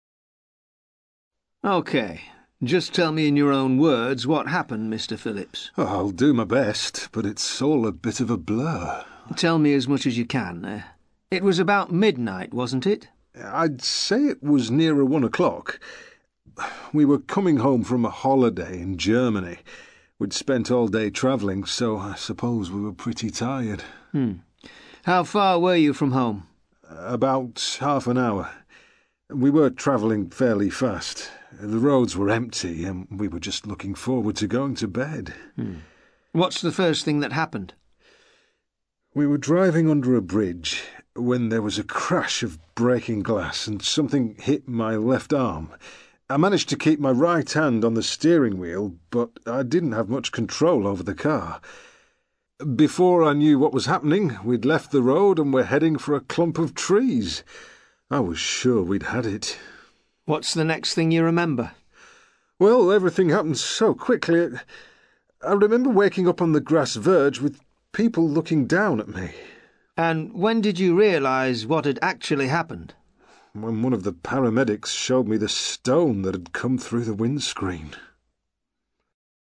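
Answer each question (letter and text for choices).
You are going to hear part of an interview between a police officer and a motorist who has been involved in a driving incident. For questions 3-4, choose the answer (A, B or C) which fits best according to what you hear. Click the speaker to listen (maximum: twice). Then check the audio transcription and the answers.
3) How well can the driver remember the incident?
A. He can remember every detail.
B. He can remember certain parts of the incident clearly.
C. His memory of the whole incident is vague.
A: C. His memory of the whole incident is vague.

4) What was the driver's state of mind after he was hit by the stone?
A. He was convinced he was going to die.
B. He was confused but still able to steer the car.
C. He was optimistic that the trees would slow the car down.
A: A. He was convinced he was going to die.

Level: CPE Proficiency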